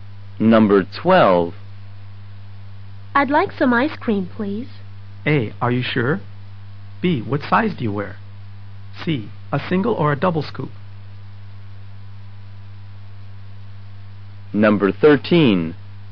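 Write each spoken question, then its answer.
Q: I'd like some ice cream, please.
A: C: A single or a double scoop?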